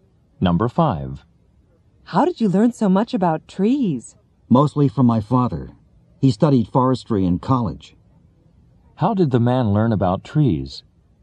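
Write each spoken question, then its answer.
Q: How did the man learn about trees?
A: Mostly from his father, who studied forestry.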